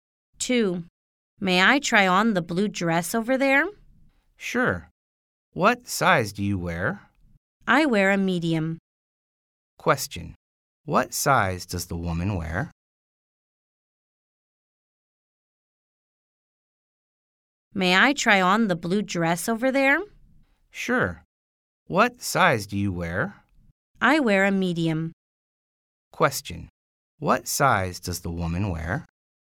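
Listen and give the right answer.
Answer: Medium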